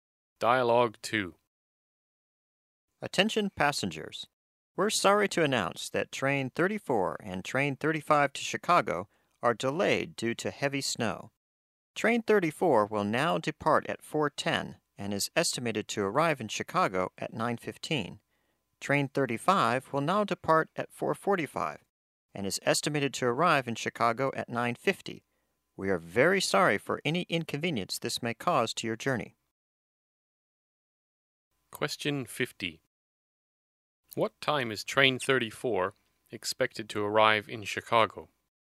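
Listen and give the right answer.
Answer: At 9:15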